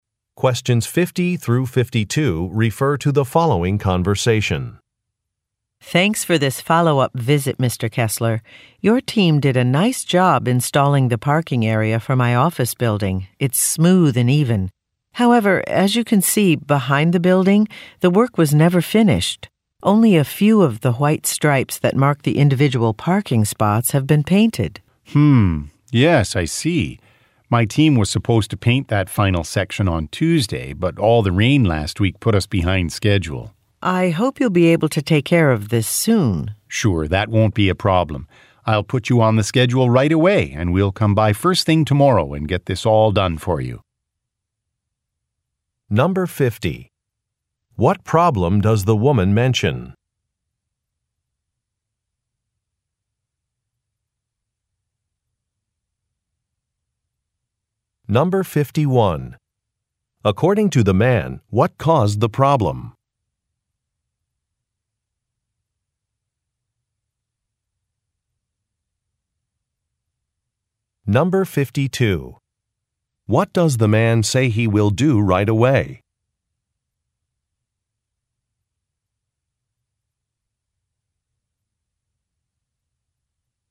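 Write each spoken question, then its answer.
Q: What problem does the woman mention?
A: The parking spaces behind the building were not fully painted; the work was never finished.

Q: According to the man, what caused the problem?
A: Rain last week put them behind schedule.

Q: What does the man say he will do right away?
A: Put her on the schedule.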